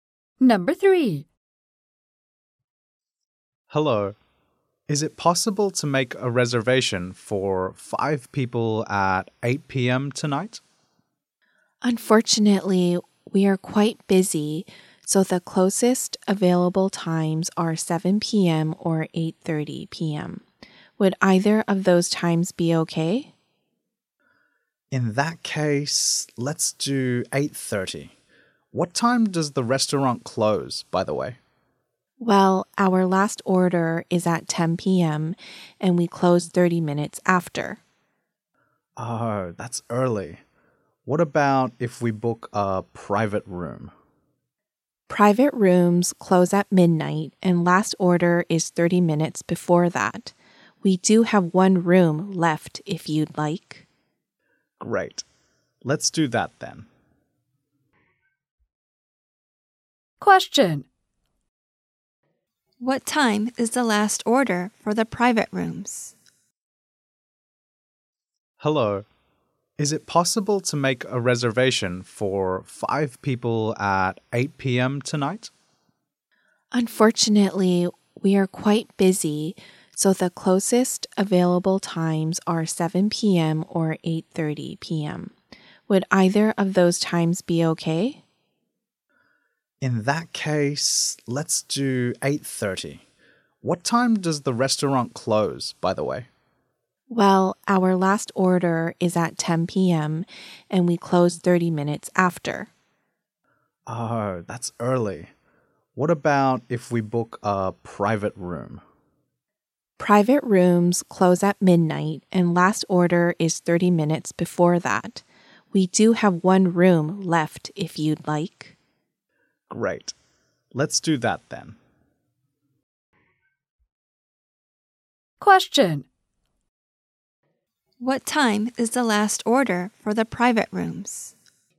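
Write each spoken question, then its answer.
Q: What time is the last order for the private rooms?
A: 11:30 p.m.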